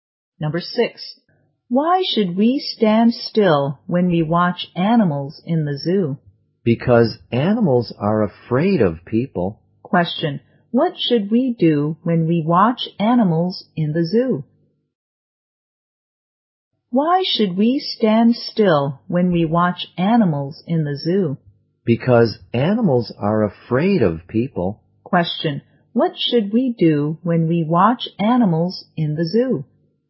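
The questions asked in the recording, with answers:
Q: Question, what should we do when we watch animals in the zoo?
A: Stand still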